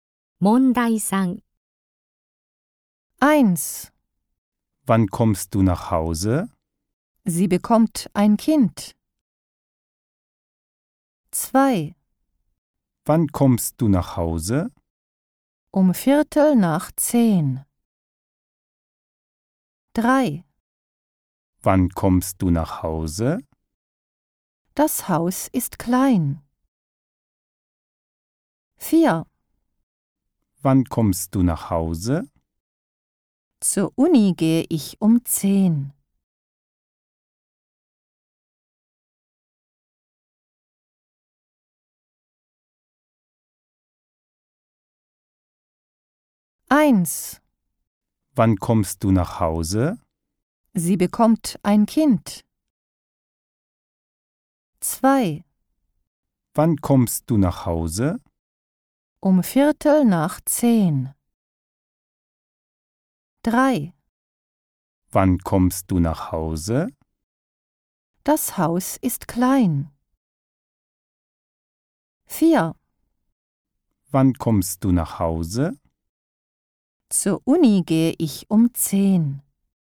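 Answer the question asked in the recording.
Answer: 2: Um 21:45.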